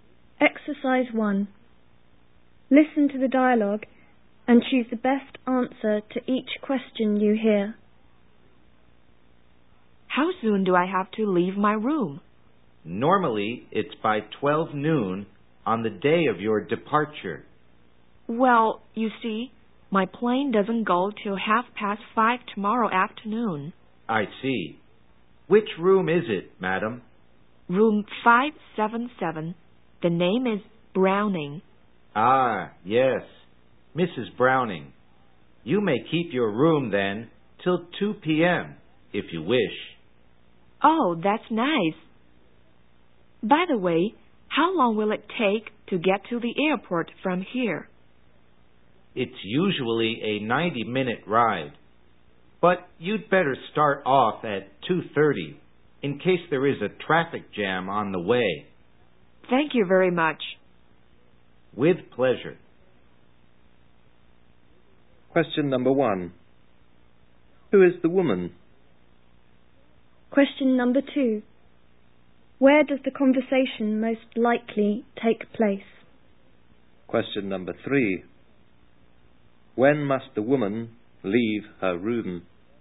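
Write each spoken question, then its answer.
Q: Who is the woman?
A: A hotel guest

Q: Where does the conversation most likely take place?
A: At a hotel

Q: When must the woman leave her room?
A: By 2 p.m.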